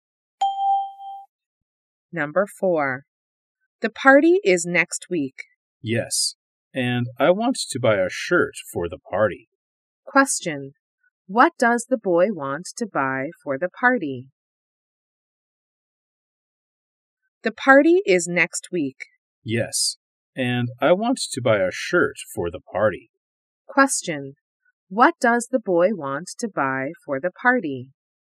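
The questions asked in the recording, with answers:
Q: What does the boy want to buy for the party?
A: A shirt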